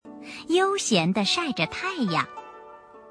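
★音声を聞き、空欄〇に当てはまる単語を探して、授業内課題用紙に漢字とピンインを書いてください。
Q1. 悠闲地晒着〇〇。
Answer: 太阳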